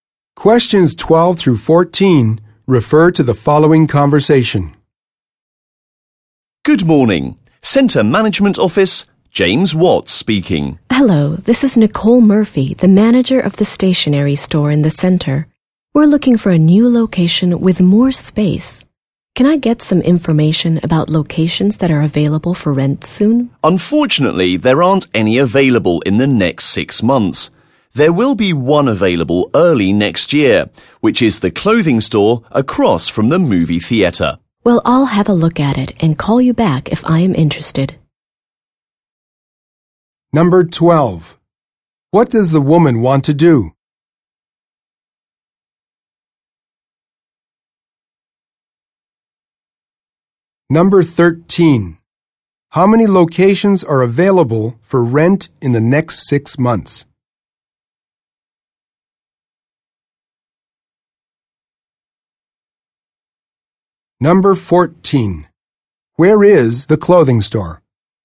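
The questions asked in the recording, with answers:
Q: What does the woman want to do?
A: Move her store to a larger location

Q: How many locations are available for rent in the next 6 months?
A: None

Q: Where is the clothing store?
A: Across from the movie theatre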